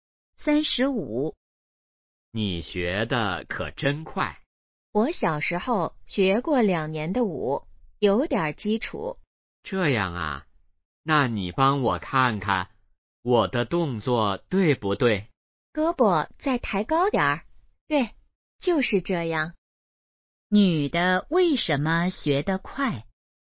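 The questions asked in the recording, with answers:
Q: 女的为什么学得快?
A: 小时候学过两年舞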